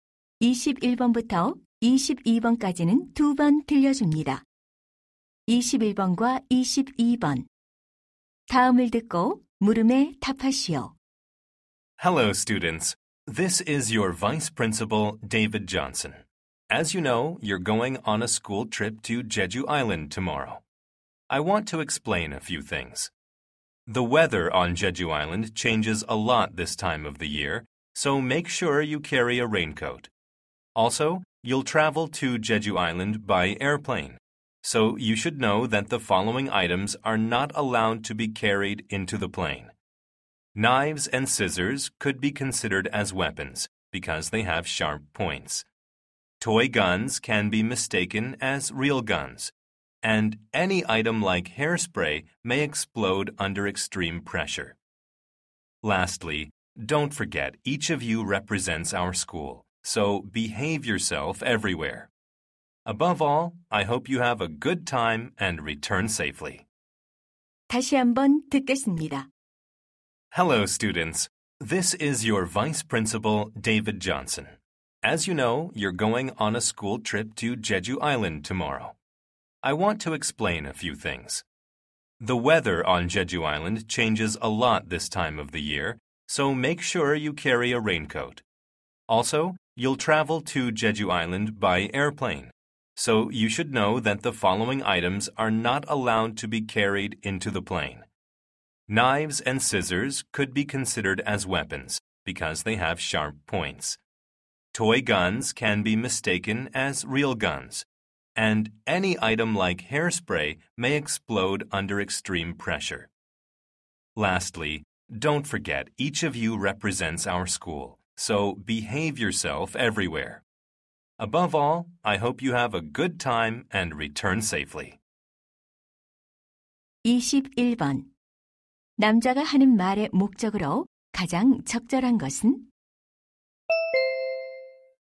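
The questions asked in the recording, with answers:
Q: 남자가 하는 말의 목적으로 가장 적절한 것은?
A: 수학여행 관련 주의 사항을 안내하려고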